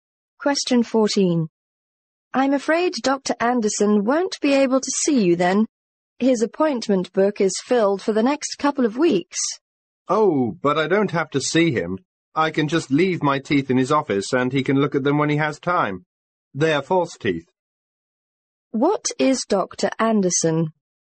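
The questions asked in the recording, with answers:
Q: What is Dr. Anderson?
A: A dentist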